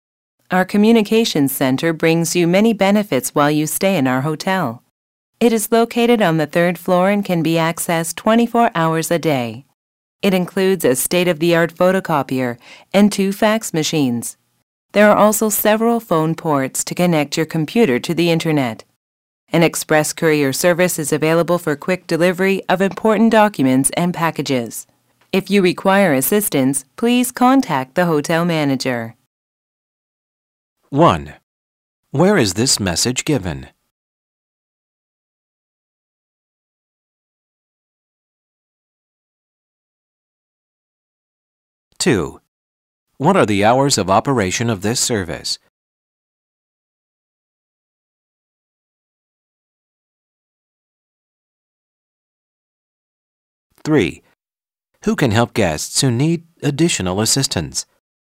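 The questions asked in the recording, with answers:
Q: Where is this message given?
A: In a hotel

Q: What are the hours of operation of this service?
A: 24 hours a day

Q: Who can help guests who need additional assistance?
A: The hotel manager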